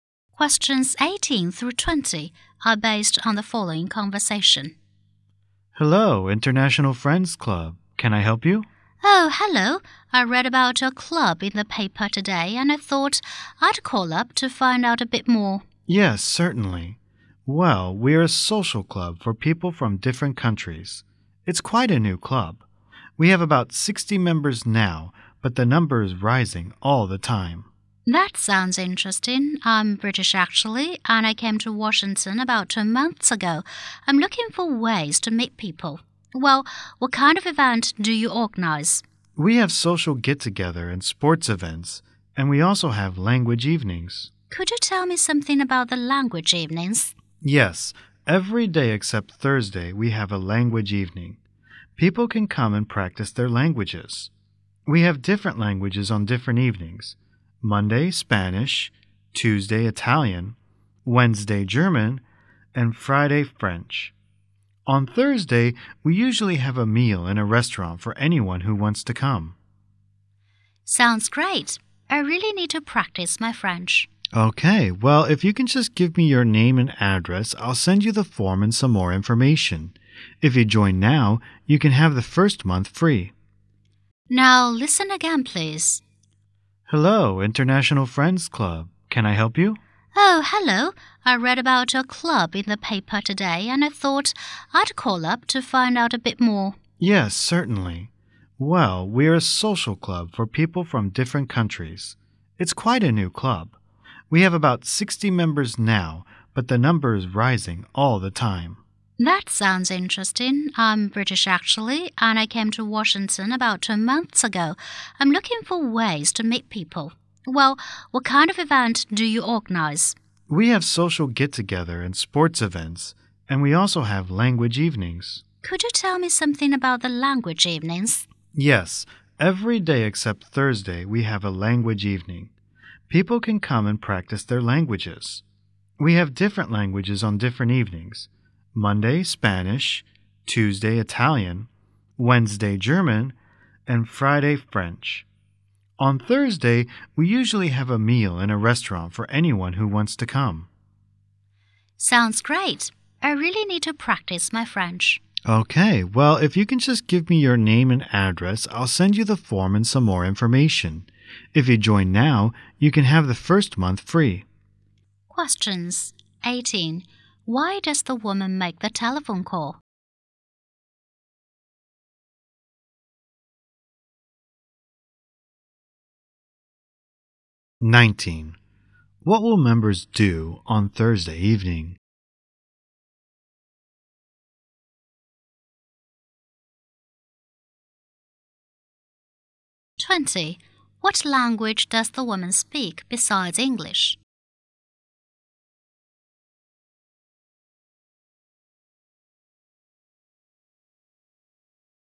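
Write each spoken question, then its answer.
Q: Why does the woman make the telephone call?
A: To find out more about the club

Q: What will members do on Thursday evening?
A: Have a meal in a restaurant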